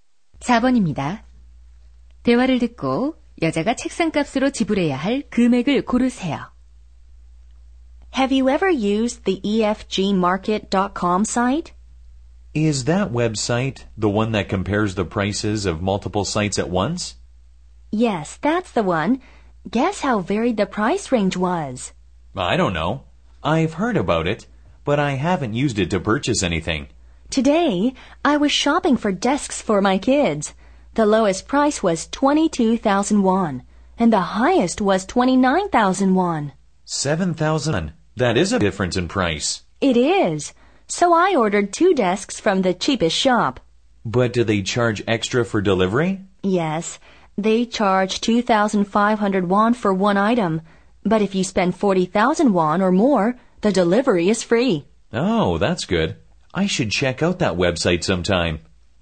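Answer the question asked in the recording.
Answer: 44,000원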